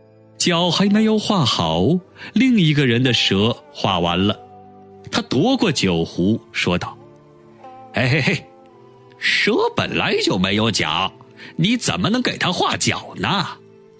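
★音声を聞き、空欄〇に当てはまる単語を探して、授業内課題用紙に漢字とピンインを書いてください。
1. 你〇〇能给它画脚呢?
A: 怎么

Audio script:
4. "我还能给蛇画上脚。"
5. 说着就去给蛇画脚。
6. 脚还没有画好,另一个人的蛇画完了。
7. 他夺过酒壶,说道:
8. "蛇本来就没有脚。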